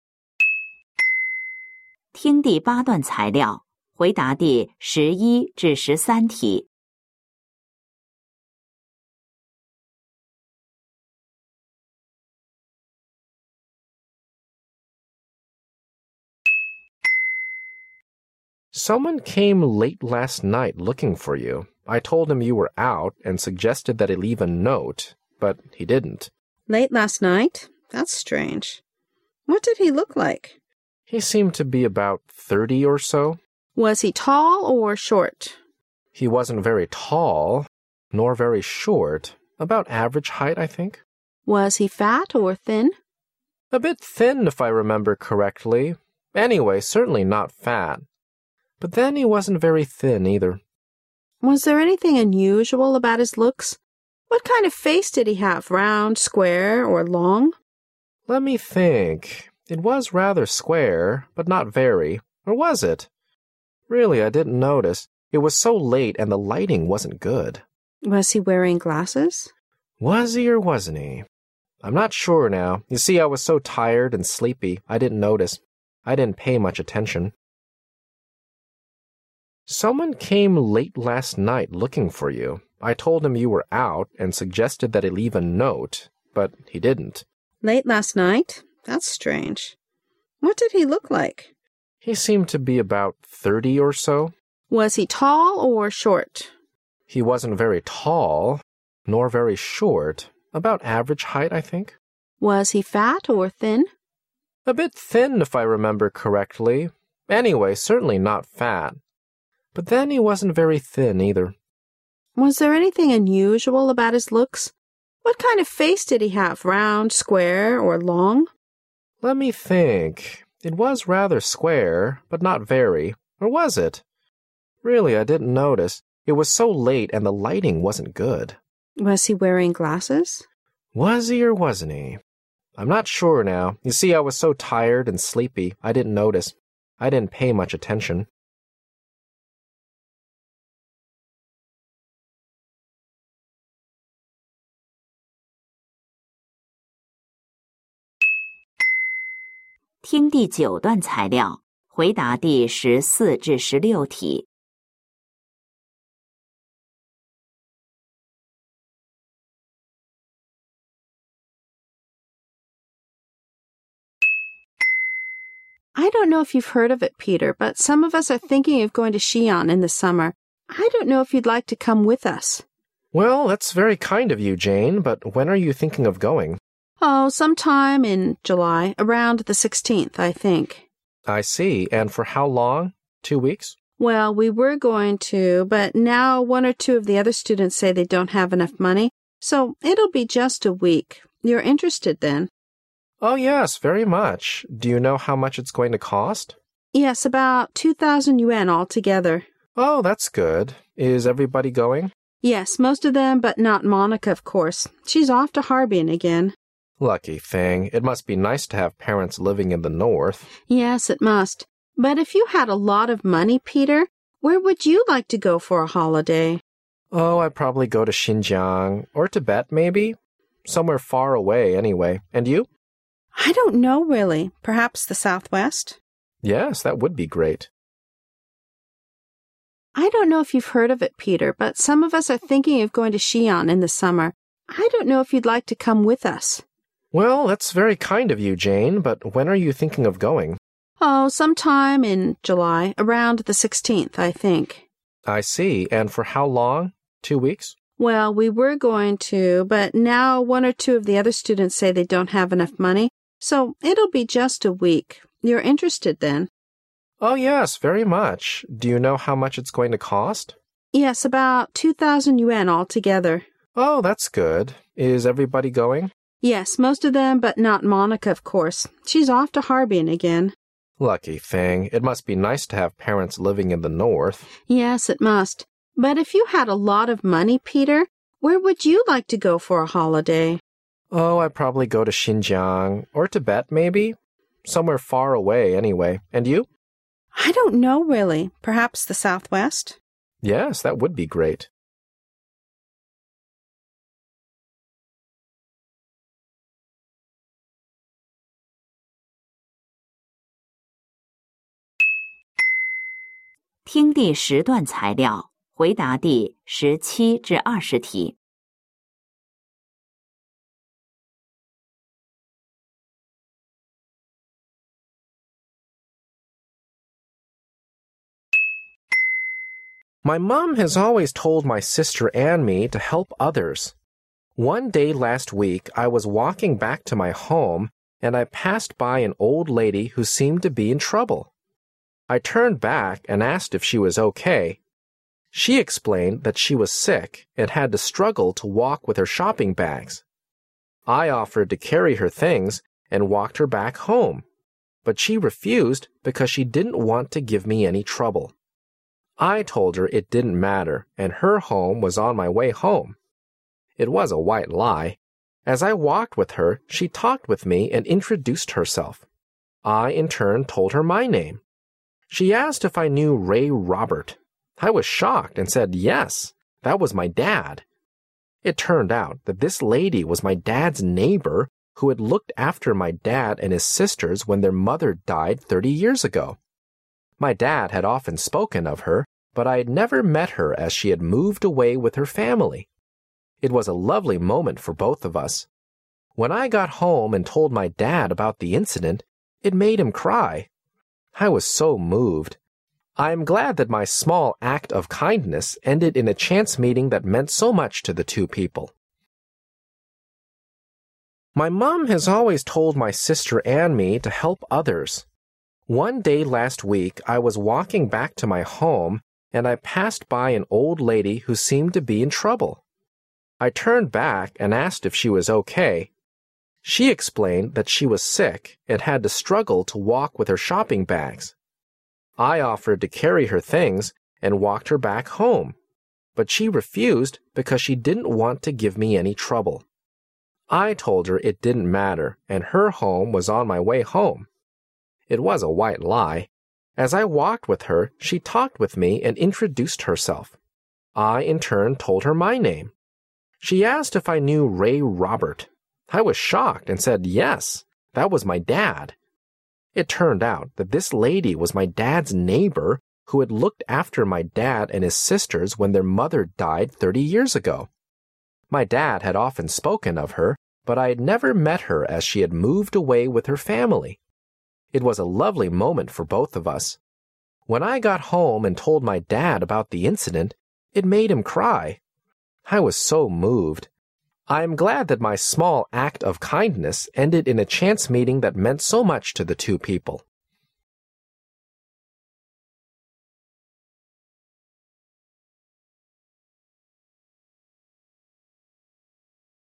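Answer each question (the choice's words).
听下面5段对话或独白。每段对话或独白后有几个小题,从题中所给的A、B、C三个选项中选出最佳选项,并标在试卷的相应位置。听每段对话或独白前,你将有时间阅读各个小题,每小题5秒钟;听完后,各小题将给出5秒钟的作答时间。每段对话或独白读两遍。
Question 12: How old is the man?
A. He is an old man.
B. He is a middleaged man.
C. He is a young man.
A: He is a young man.

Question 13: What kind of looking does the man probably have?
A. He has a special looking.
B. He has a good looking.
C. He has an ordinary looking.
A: He has an ordinary looking.

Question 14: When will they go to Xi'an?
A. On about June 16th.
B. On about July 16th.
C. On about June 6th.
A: On about July 16th.

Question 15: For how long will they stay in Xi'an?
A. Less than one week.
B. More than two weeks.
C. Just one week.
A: Just one week.

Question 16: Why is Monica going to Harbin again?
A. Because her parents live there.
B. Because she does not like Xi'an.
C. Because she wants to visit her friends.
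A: Because her parents live there.

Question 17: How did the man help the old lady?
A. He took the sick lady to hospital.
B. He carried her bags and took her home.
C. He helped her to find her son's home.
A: He carried her bags and took her home.

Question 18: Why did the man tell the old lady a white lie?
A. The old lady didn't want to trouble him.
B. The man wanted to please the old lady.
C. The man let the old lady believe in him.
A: The old lady didn't want to trouble him.

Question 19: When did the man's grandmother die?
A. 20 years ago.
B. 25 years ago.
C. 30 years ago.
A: 30 years ago.

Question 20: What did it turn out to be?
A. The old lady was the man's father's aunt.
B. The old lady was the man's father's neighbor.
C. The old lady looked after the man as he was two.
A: The old lady was the man's father's neighbor.

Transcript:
M:Someone came late last night looking for you.I told him you were out and suggested that he leave a no te,but he didn't.
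W:Late last night?That's strange.What did he look like?
M:He seemed to be about thirty or so.
W:Was he tall or short?
M:He wasn't very tall,nor very short.About aver age height,I think.
W:Was he fat or thin?
M:A bit thin,if I remember correctly.Anyway,certainly not fat,but then he wasn't very thin either.
W:Was there anything unusual about his looks?What kind of face did he have—round,square or long?
M:Let me think...It was rather square,but not very.Or was it?Really,I didn't notice.It was so late and the lighting wasn't good.
W:Was he wearing glasses?
M:Was he or wasn't he?I'm not sure now.You see,I was so tired and sleepy.I didn't notice.I didn't pay much attention.
W:I don't know if you've heard of it,Peter,but some of us are thinking of going to Xi'an in the summer.I don't know if you'd like to come with us.
M:Well,that's very kind of you,Jane,but when are you thinking of going?
W:Oh,some time in July.Around the 16th,I think.
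M:I see.And for how long—two weeks?
W:Well,we were going to but now one or two of the other students say they don't have enough money,so it'll just be a week.You're interested,then?
M:Oh,yes,very much.Do you know how much it's going to cost?
W:Yes,about 2000 yuan altogether.
M:Oh,that's good.Is everybody going?
W:Yes,most of them,not Monica,of course.She's off to Harbin again.
M:Lucky thing!It must be nice to have parents living in the north.
W:Yes,it must.But if you had a lot of money,Peter,where would you like to go for a holiday?
M:Oh,I'd probably go to Xinjiang,or Tibet maybe.Somewhere far away,anyway.And you?
W:I don't know really.Perhaps the southwest.
M:Yes,that would be great.
My mum has always told my sister and me to help others.One day last week I was walking back to my home and I passed by an old lady who seemed to be in trouble.I turned back and asked if she was OK,she explained that she was sick and had to struggle to walk with her shopping bags.I offered to carry her things and walked her back home,but she refused because she didn't want to give me any trouble.I told her it didn't matter and her home was on my way home.It was a white lie.As I walked with her she talked with me and introduced herself.I in turn told her my name.She asked if I knew Ray Robert.I was shocked and said yes,that was my dad.It turned out that this lady was my dad's neighbor who had looked after my dad and his sisters when their mother died thirty years ago.My dad had often spoken of her but I had never met her as she had moved away with her family.It was a lovely moment for both of us.When I got home and told my dad about the incident,it made him cry.I was so moved.I am glad that my small active kindness ended in a chance meeting that meant so much to the two people.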